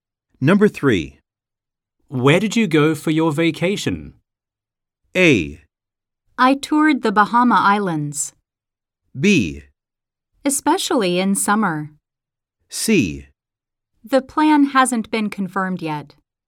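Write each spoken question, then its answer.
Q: Where did you go for your vacation?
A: A: I toured the Bahama Islands.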